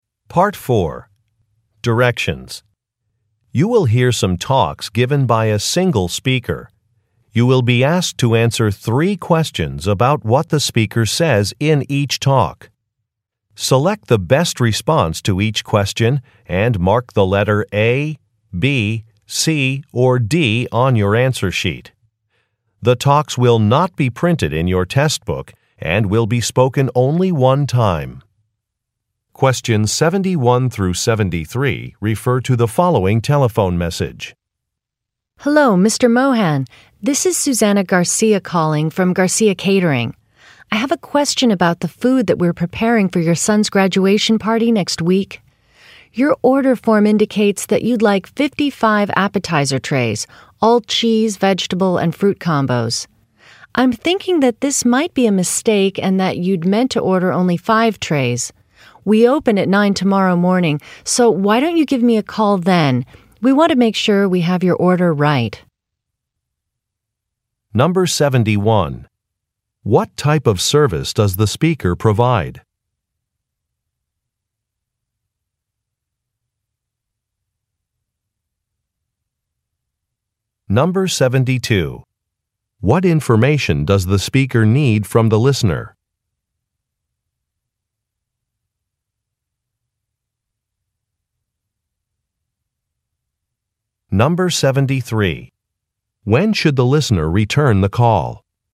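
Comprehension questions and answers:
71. What type of service does the speaker provide?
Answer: Food preparation

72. What information does the speaker need from the listener?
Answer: The size of an order

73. When should the listener return the call?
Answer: Tomorrow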